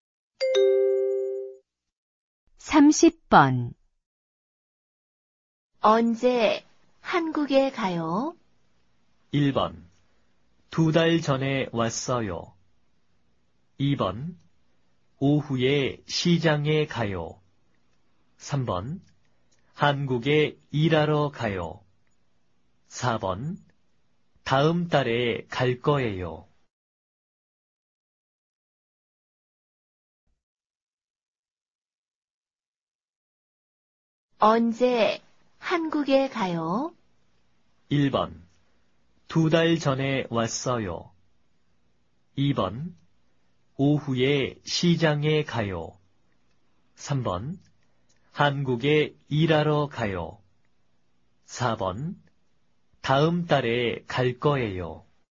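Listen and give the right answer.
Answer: 4: 다음 달에 갈 거예요.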